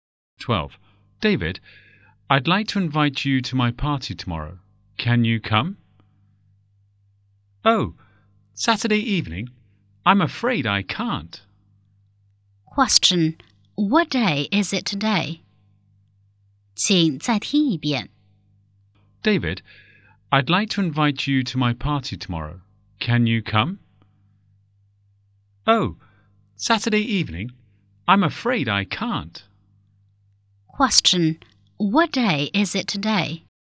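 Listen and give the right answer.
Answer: Friday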